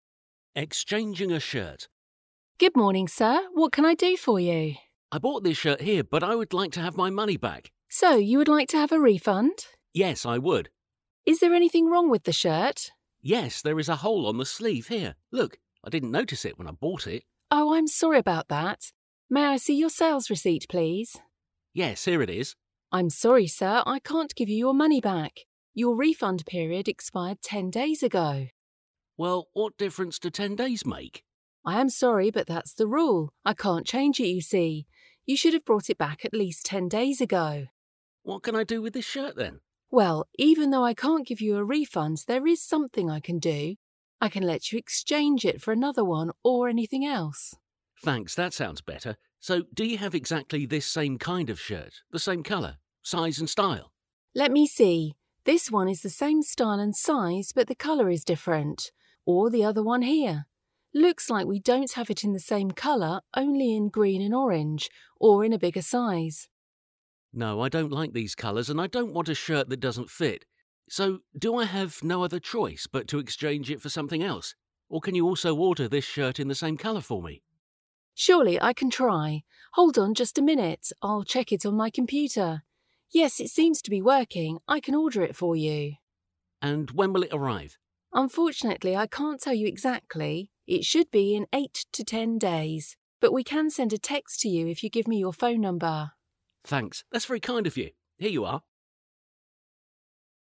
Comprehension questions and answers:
Listen to the dialogue, then read about it again and fill in the gaps with the information you have heard.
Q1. The man went to the shop because he wanted to .......... (1).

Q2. The shirt he had bought had .......... (2) on it but he didn't .......... (3) it when he bought it.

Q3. The shirt he had bought had .......... (2) on it but he didn't .......... (3) it when he bought it.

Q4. The shop assistant wanted to see ......... (4).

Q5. She was sorry and said that the customer should have brought the shirt back at least .......... (5).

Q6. But she could let the customer ....... (6) it.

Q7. Unfortunately, they had the same style and size shirt only in .......... (7) or in .......... (8).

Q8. Unfortunately, they had the same style and size shirt only in .......... (7) or in .......... (8).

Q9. The shop assistant offered to ......... (9) another shirt for him.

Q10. It will arrive in .......... (10).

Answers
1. have his money back/get back his money
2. a hole
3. notice
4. the sales receipt
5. ten days ago
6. exchange
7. green and orange/in different colours
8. a bigger size
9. order
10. 8 to 10 days

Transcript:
Exchanging a shirt
W: Good morning sir, what can I do for you?
M: I bought this shirt here but I would like to have my money back.
W: So you would like to have a refund?
M: Yes, I would.
W: Is there anything wrong with the shirt?
M: Yes, there is a hole on the sleeve here. Look. I didn't notice it when I bought it.
W: Oh, I'm sorry about that. May I see your sales receipt, please?
M: Yes, here it is.
W: I'm sorry sir. I can't give you your money back. Your refund period expired ten days ago.
M: Well, what difference do ten days make?
W: I am sorry but that's the rule. I can't change it you see. You should have brought it back at least ten days ago.
M: What can I do with this shirt then?
W: Well, even though I can't give you a refund, there is something I can do. I can let you exchange it for another one or anything else.
M: Thanks that sounds better. So do you have exactly this same kind of shirt, the same colour, size and style?
W: Let me see. This one is the same style and size, but the colour is different. Or the other one here. Looks like we don't have it in the same colour only in green and orange. Or in a bigger size.
M: No, I don't like these colours and I don't want a shirt that doesn't fit. So, do I have no other choice but to exchange it for something else? Or can you also order this shirt in the same colour for me?
W: Surely I can try. Hold on just a minute, I'll check it on my computer. Yes, it seems to be working, I can order it for you.
M: And when will it arrive?
W: Unfortunately, I can't tell you exactly, It should be in 8 to 10 days, But we can send a text to you if you give me your phone number.
M: Thanks, that's very kind of you. Here you are.

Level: alapfokon (B1)